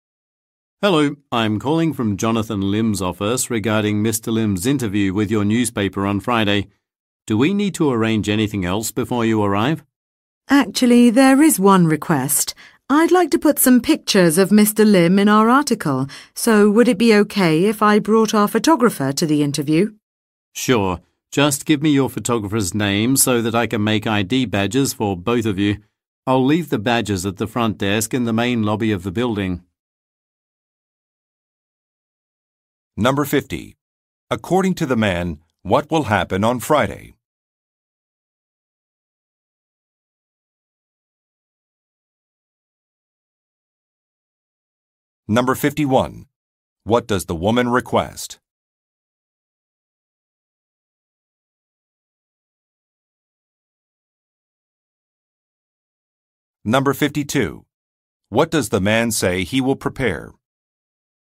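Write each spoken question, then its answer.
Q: According to the man, what will happen on Friday?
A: An interview with a newspaper

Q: What does the woman request?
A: To bring a photographer to the interview

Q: What does the man say he will prepare?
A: ID badges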